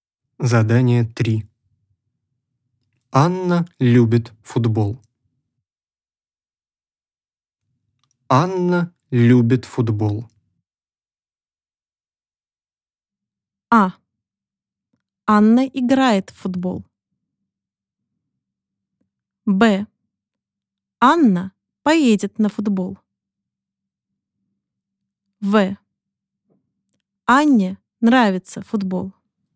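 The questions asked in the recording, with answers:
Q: Анна любит футбол.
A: В: Анне нравится футбол.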